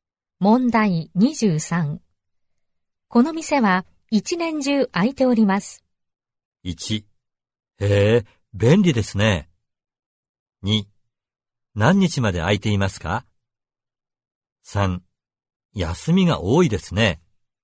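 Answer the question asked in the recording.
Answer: 1: へえ、便利ですね。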